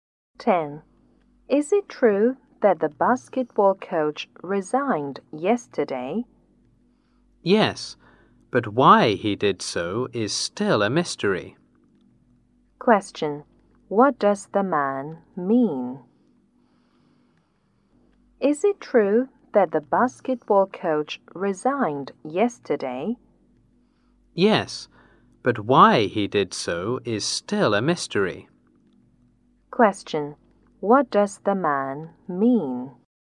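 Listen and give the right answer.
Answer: The coach did resign, but nobody knows why.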